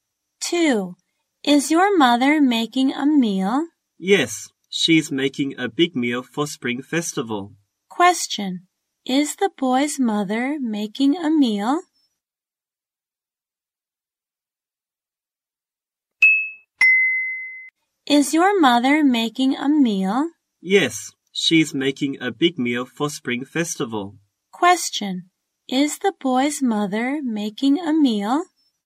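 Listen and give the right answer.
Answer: Yes, she's making a big meal for Spring Festival.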